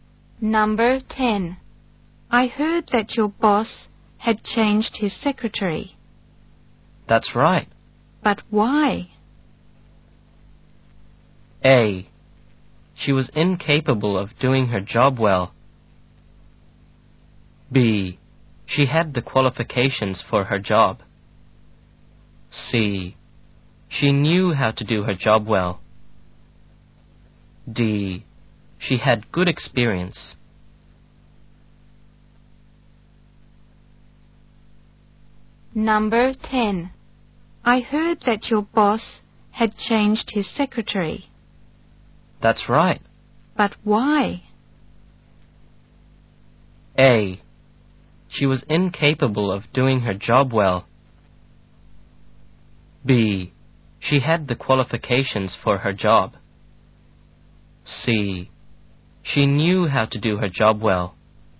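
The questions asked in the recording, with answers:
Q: But why?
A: A: She was incapable of doing her job well.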